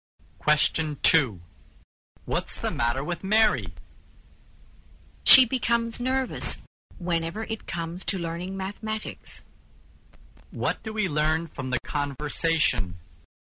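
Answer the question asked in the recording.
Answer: Mary gets nervous whenever she has to learn mathematics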